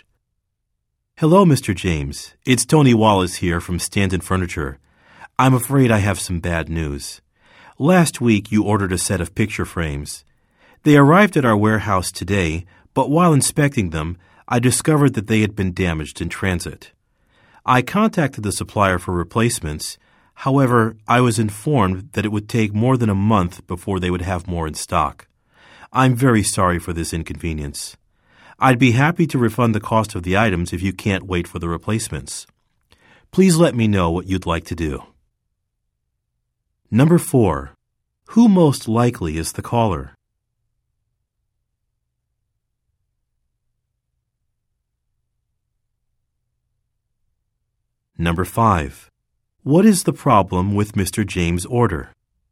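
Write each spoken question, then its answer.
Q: Who most likely is the caller?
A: An employee of Stanton Furniture

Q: What is the problem with Mr. James' order?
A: The picture frames were damaged in transit

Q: What does the caller offer to do?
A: Refund the cost of the items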